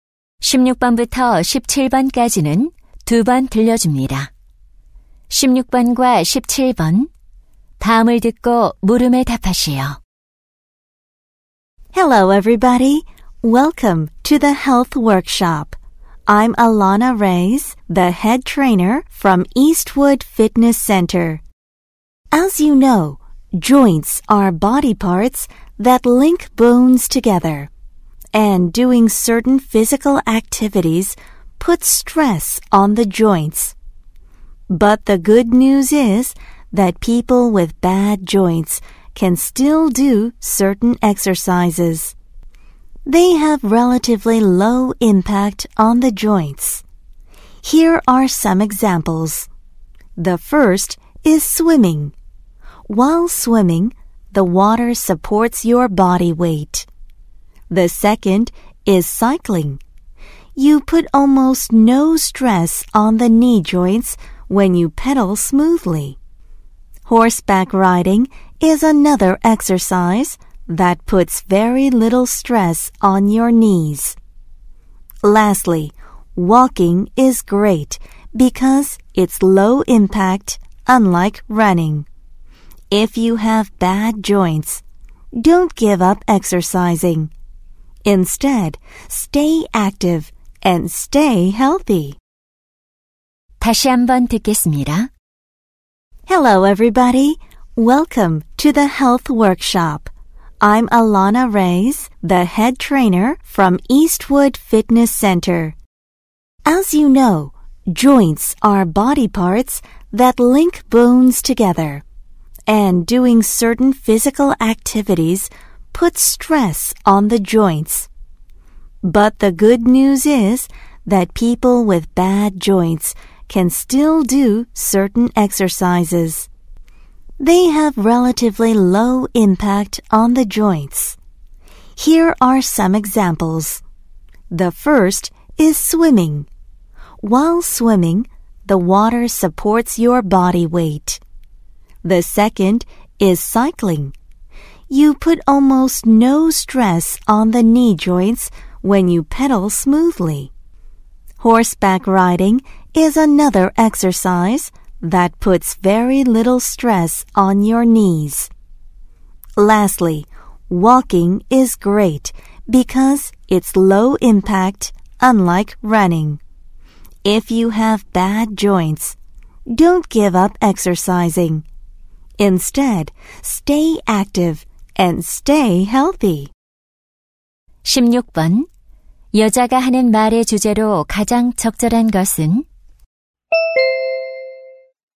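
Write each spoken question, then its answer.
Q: 여자가 하는 말의 주제로 가장 적절한 것은?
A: 관절이 안 좋은 사람에게 좋은, 관절에 부담이 적은 운동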